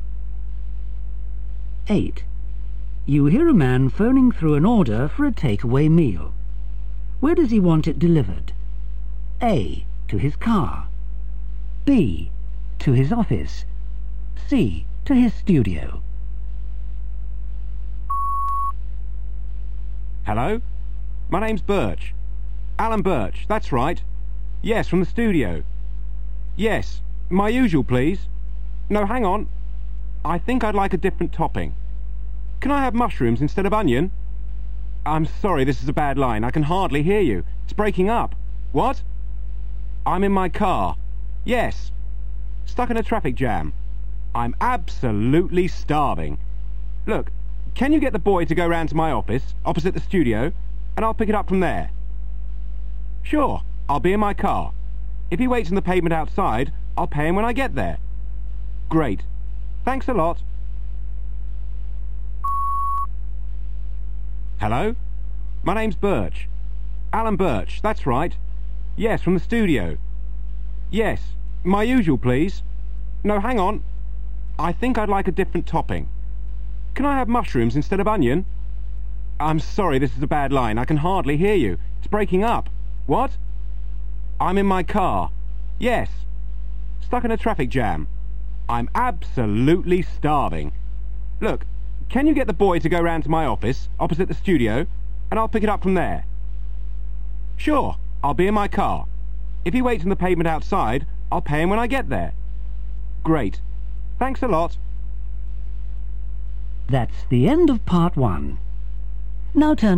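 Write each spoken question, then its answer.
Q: Where does he want it delivered?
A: B: To his office.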